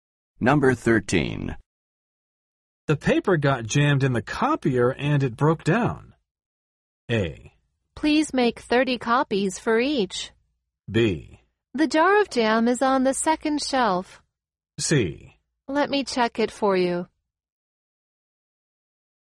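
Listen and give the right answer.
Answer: C: Let me check it for you.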